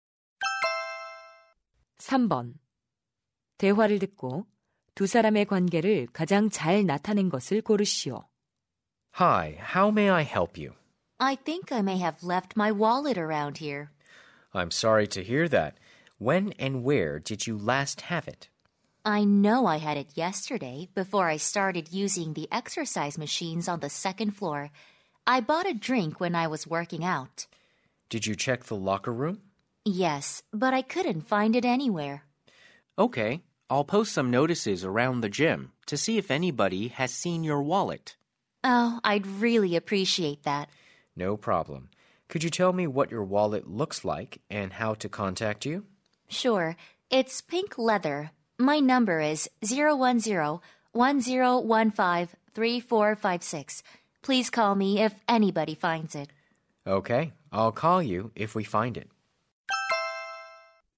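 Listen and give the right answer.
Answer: 체육관 직원 - 회원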